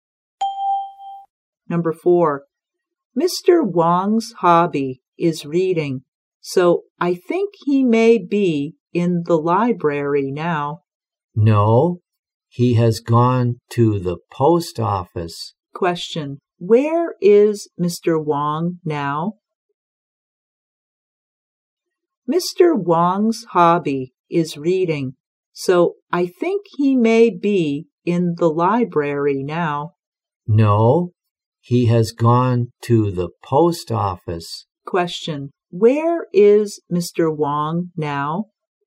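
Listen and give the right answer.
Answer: At the post office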